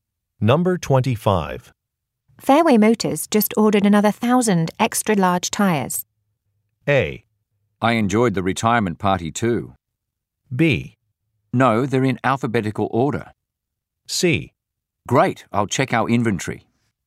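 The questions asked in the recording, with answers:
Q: Fairway Motors just ordered another 1,000 extra large tires.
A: C: Great, I'll check our inventory.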